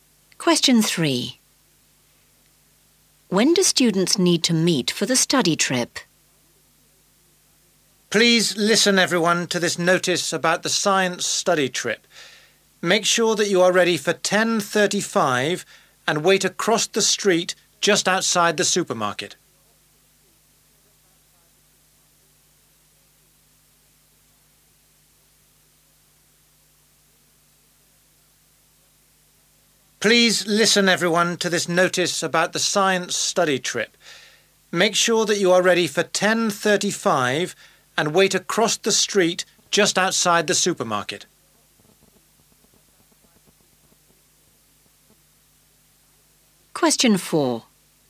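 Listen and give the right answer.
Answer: 10:35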